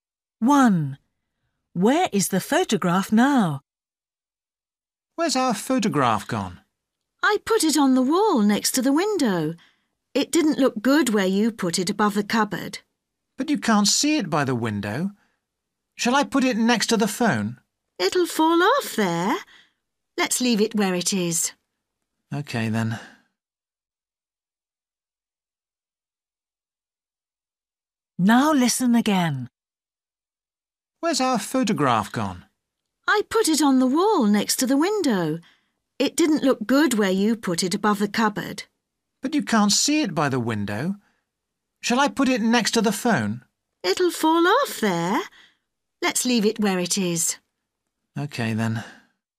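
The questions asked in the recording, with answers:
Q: Where is the photograph now?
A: On the wall next to the window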